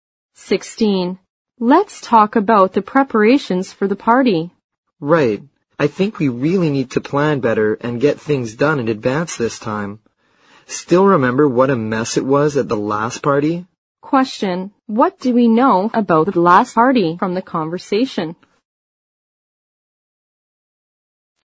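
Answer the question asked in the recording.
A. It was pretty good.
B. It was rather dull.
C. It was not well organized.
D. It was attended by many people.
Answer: C. It was not well organized.

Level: 六级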